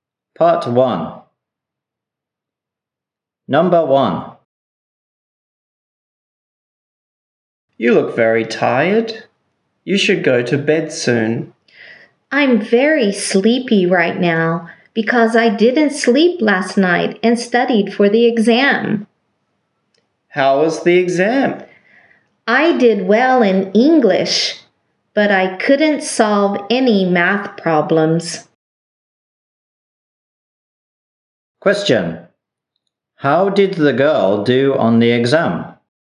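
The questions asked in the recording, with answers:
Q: How did the girl do on the exam?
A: She did well in English but couldn't solve any math problems.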